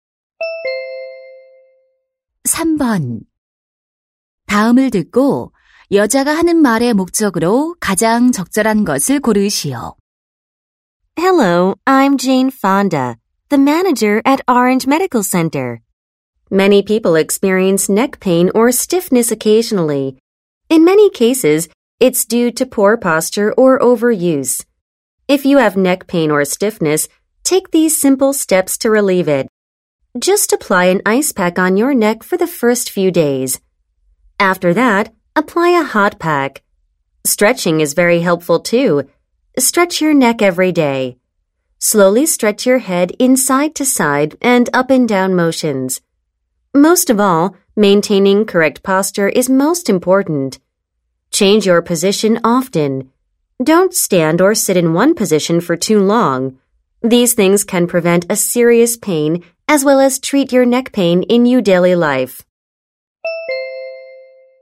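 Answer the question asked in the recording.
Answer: 목 통증이나 뻣뻣함을 완화하는 방법을 알려 주려고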